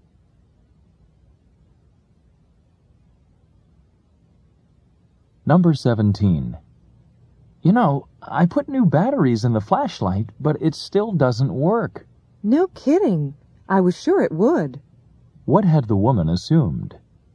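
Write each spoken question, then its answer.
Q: What had the woman assumed?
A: That the new batteries would make the flashlight work.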